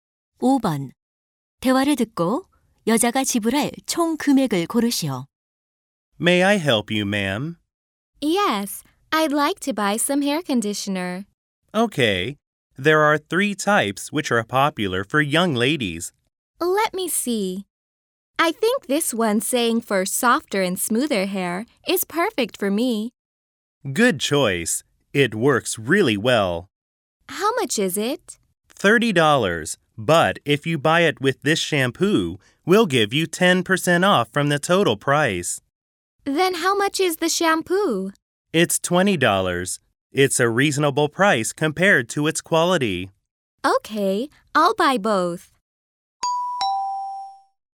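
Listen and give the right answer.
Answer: $45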